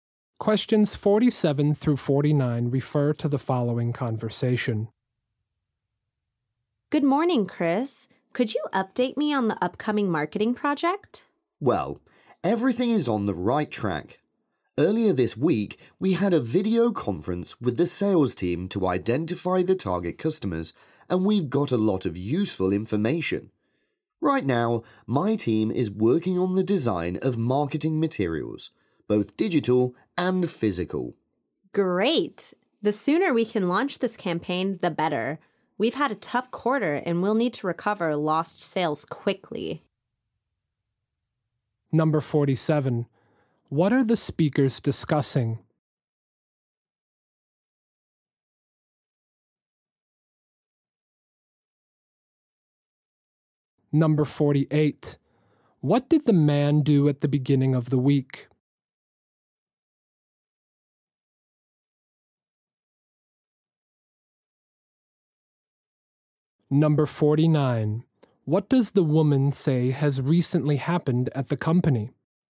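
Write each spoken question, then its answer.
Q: What are the speakers discussing?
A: An upcoming marketing project

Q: What did the man do at the beginning of the week?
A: He had a video conference with the sales team

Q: What does the woman say has recently happened at the company?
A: The company had a tough quarter and lost sales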